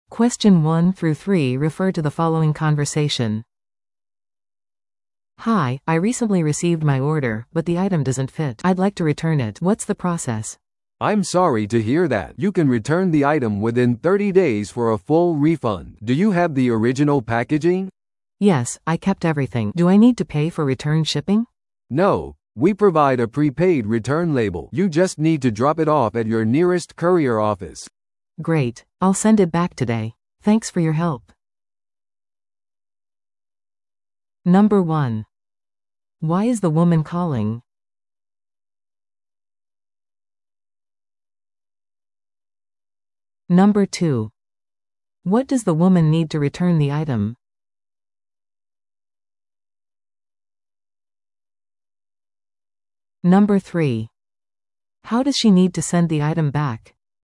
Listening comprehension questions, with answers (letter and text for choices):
Listen to the audio below and answer the questions.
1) Why is the woman calling?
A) 注文をキャンセルするため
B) 商品を返品するため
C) 配送先住所を変更するため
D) 交換品を依頼するため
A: B) 商品を返品するため

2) What does the woman need to return the item?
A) 領収書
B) 元の梱包材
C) 追跡番号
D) カスタマーサービスの承認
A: B) 元の梱包材

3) How does she need to send the item back?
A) 送料を支払ってラベルを購入する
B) 事前に支払われた返品ラベルを使用する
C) 実店舗に訪問する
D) 配送業者に電話する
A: B) 事前に支払われた返品ラベルを使用する

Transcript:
A: "Hi, I recently received my order, but the item doesn't fit. I'd like to return it. What's the process?"
B: "I'm sorry to hear that. You can return the item within 30 days for a full refund. Do you have the original packaging?"
A: "Yes, I kept everything. Do I need to pay for return shipping?"
B: "No, we provide a prepaid return label. You just need to drop it off at your nearest courier office."
A: "Great! I'll send it back today. Thanks for your help!"